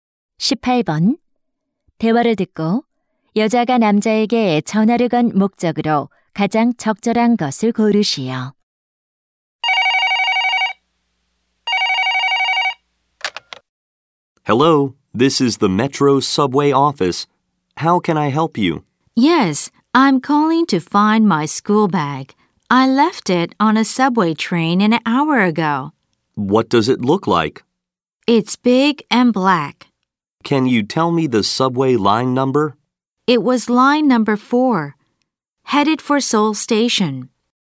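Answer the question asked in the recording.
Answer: 잃어버린 책가방을 찾으려고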